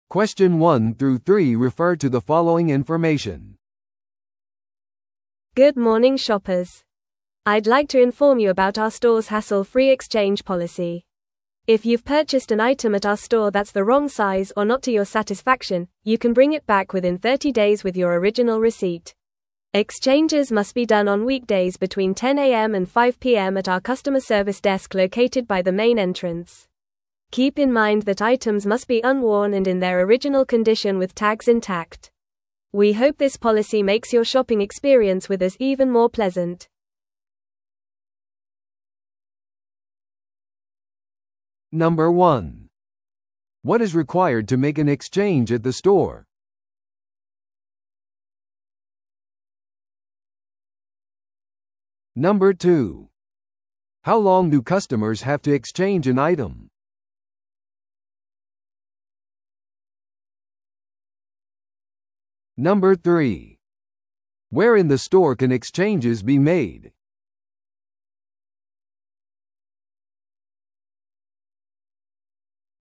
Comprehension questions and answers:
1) What is required to make an exchange at the store?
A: レシート原本

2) How long do customers have to exchange an item?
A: 購入から30日間

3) Where in the store can exchanges be made?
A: メインエントランス近くのカスタマーサービスデスクで

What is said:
Good morning shoppers! I'd like to inform you about our store's hassle-free exchange policy. If you've purchased an item at our store that's the wrong size or not to your satisfaction, you can bring it back within 30 days with your original receipt. Exchanges must be done on weekdays between 10am and 5pm at our customer service desk located by the main entrance. Keep in mind that items must be unworn and in their original condition with tags intact. We hope this policy makes your shopping experience with us even more pleasant.